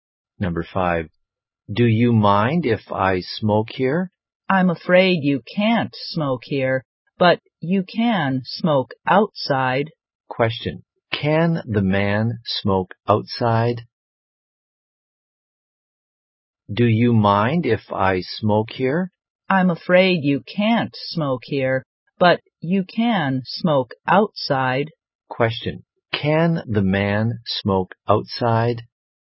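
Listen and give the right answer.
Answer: Yes, he can.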